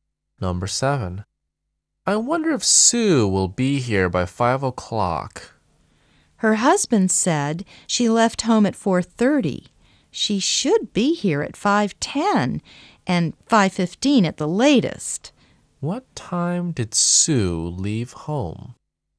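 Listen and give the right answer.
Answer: At 4:30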